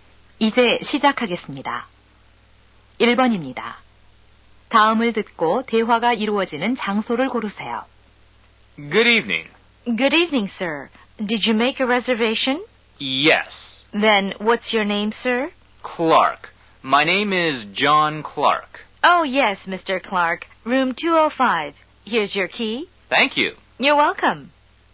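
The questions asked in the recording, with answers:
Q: 다음을 듣고 대화가 이루어지는 장소를 고르세요.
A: 호텔 (프런트)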